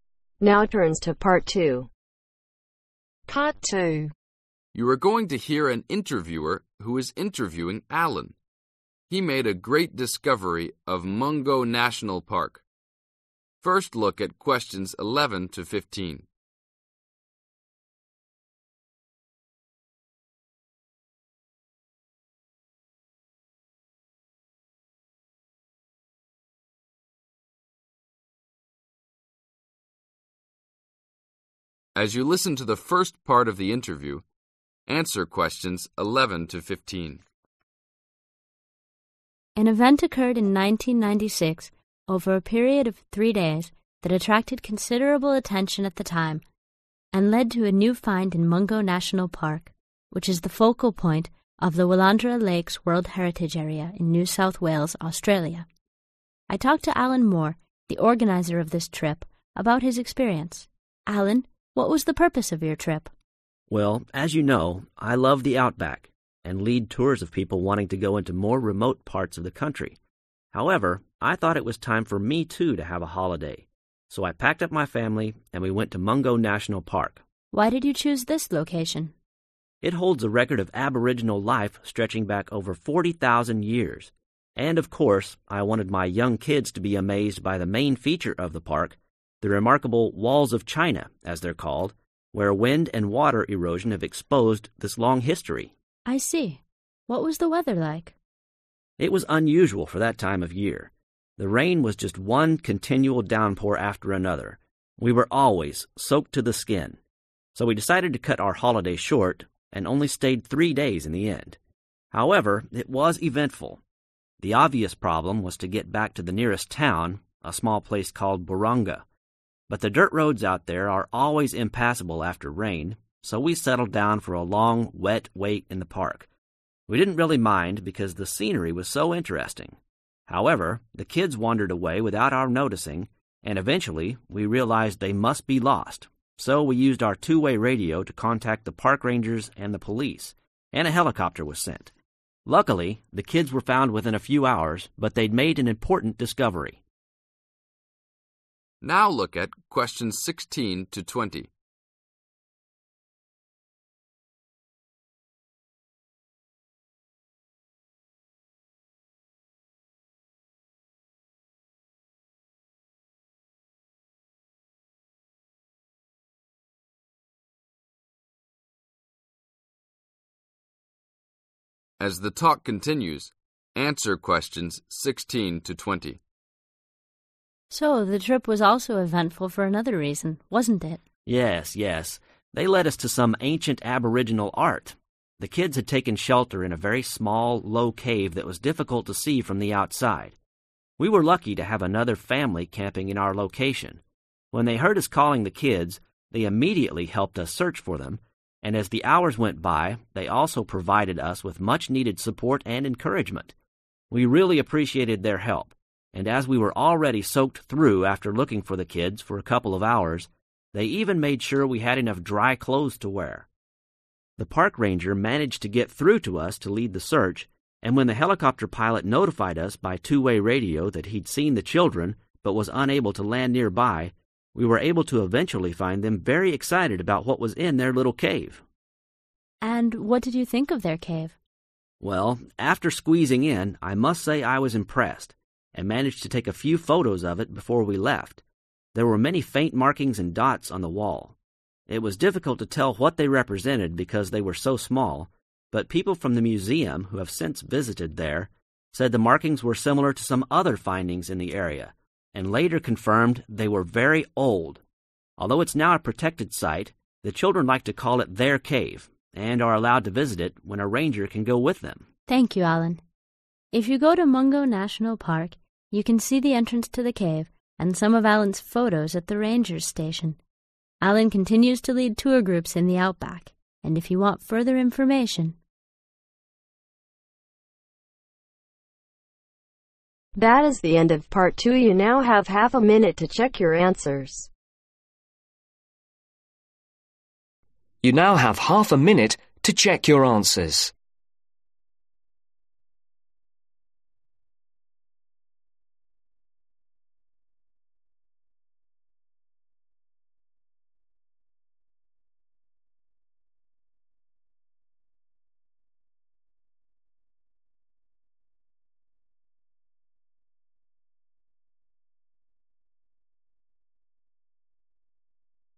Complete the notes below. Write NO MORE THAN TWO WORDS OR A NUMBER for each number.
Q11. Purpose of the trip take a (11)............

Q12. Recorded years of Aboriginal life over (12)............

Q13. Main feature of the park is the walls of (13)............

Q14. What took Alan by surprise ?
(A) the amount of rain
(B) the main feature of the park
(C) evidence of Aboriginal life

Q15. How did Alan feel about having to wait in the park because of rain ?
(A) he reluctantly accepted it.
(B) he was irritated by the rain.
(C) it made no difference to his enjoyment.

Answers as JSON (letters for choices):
{"11": "Holiday", "12": "40,000 years", "13": "China", "14": "A", "15": "C"}